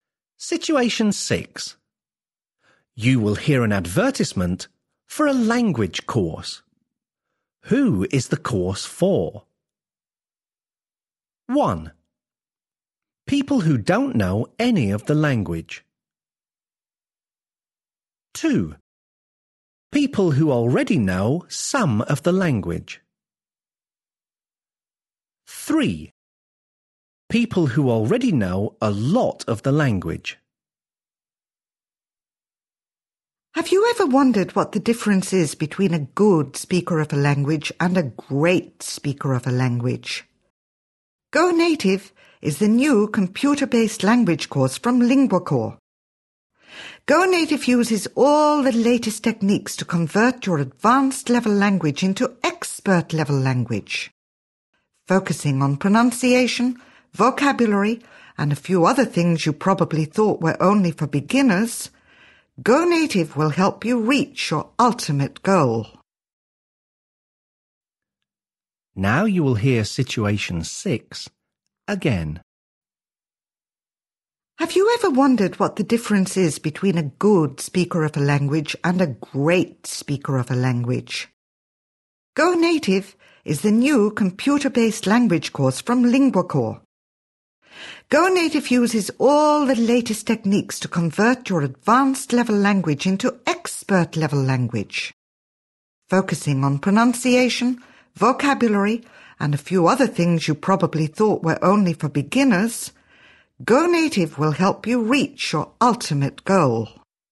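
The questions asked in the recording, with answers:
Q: Who is the course for? 1.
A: 3: People who already know a lot of the language.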